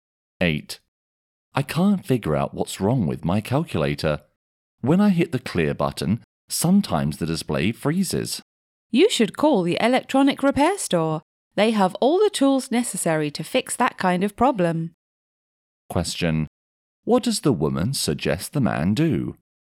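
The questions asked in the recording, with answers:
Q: What does the woman suggest the man do?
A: Call the electronic repair store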